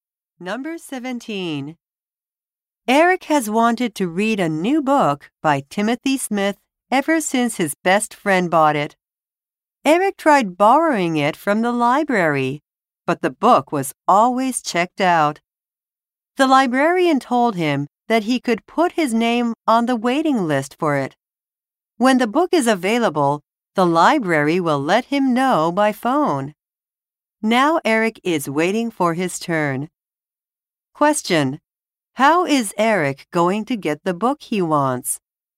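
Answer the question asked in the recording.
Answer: By waiting on the library's waiting list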